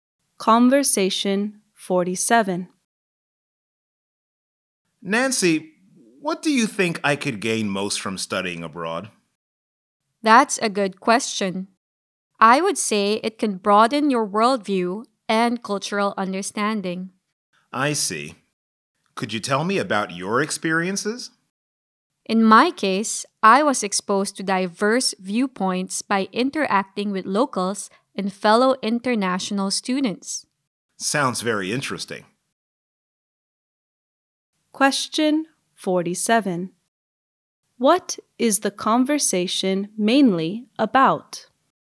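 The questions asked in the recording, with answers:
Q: What is the conversation mainly about?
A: What you can gain from studying abroad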